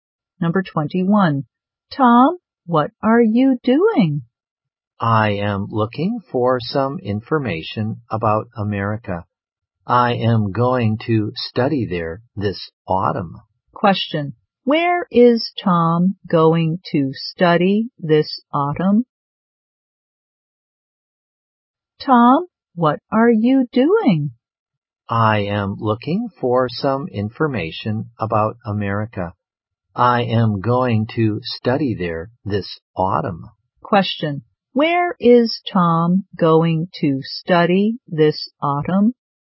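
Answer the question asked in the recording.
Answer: In America.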